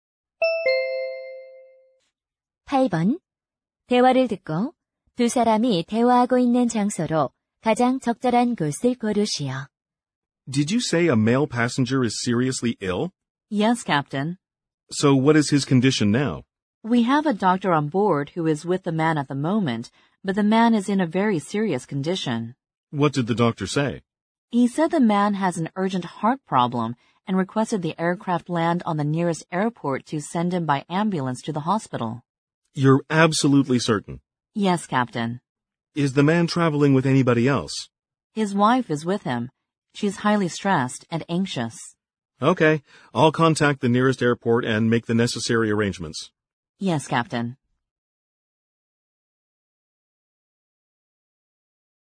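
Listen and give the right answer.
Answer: 비행기 안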